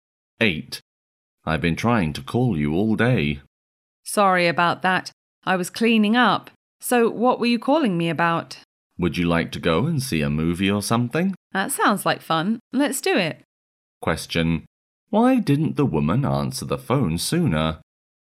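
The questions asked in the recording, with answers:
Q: why didn't the woman answer the phone sooner?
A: She was cleaning up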